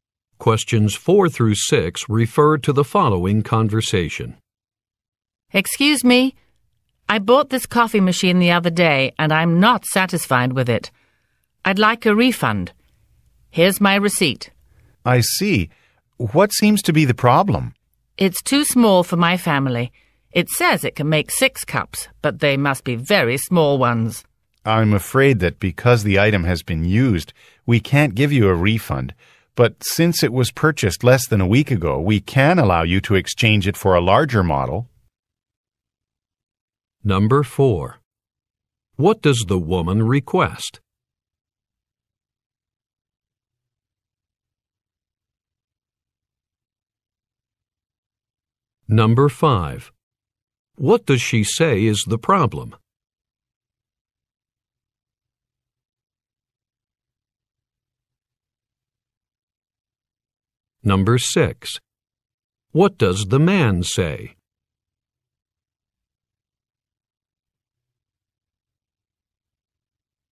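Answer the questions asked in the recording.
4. A refund
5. The coffee machine is too small for her family
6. She can't get a refund but can exchange it for a larger model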